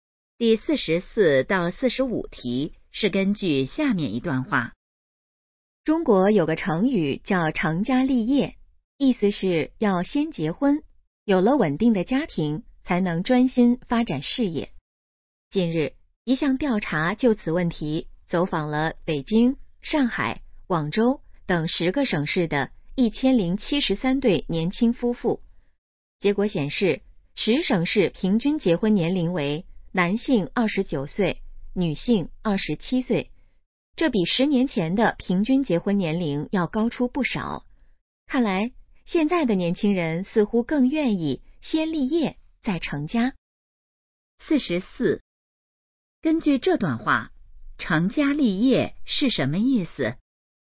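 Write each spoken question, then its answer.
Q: 根据这段话,成家立业是什么意思?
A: 先结婚有稳定家庭,再专心发展事业

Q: 这项调查走访了多少对夫妻?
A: 1073对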